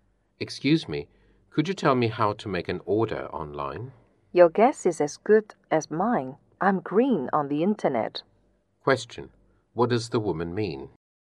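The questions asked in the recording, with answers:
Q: What does the woman mean?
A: She doesn't know how; she is new to the internet.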